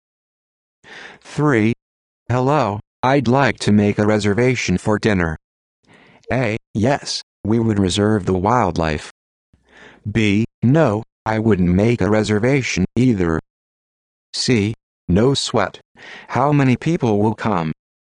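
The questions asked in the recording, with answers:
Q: Hello, I'd like to make a reservation for dinner.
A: C: No sweat. How many people will come?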